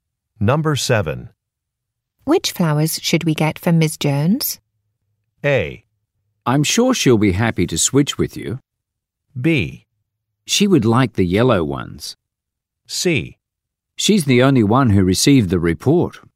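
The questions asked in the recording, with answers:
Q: Which flowers should we get from Ms. Jones?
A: B: She would like the yellow ones.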